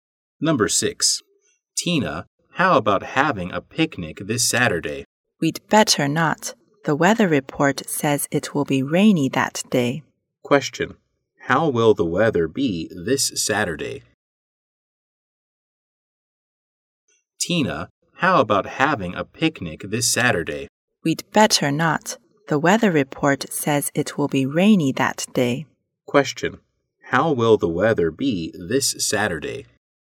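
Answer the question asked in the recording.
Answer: Rainy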